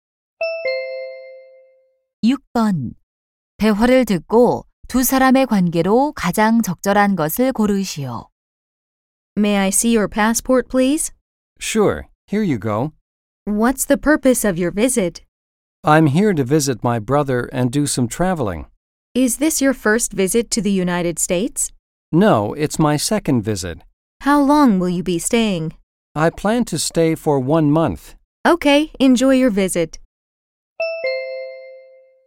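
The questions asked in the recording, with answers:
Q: 대화를 듣고 두 사람의 관계로 가장 적절한 것을 고르시오.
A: 입국 심사관 - 여행객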